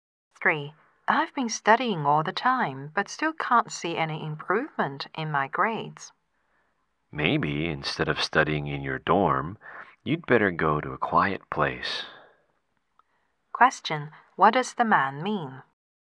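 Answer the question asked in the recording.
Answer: She should study in a quiet place instead of her dorm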